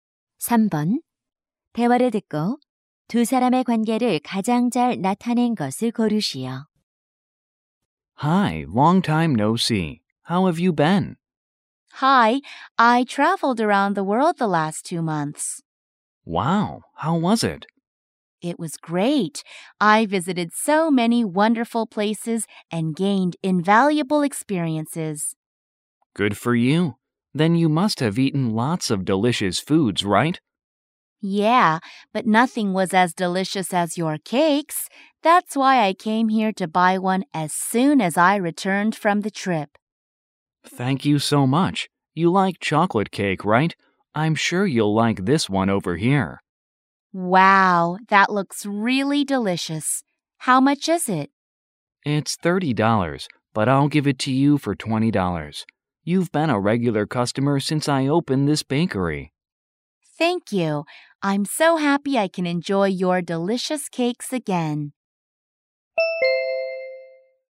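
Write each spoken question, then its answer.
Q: 대화를 듣고 두 사람의 관계를 가장 잘 나타낸 것을 고르시오.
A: 제과점 주인과 단골손님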